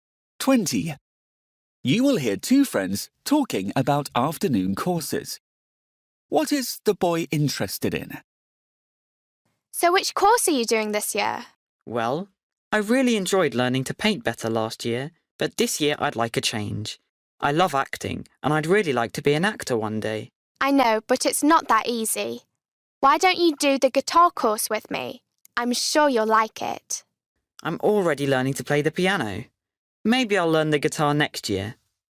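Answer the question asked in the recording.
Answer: acting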